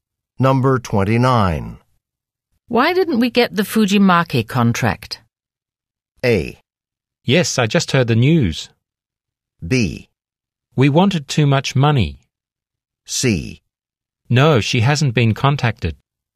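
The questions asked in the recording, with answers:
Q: Why didn't we get the Fujimaki contract?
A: B: We wanted too much money.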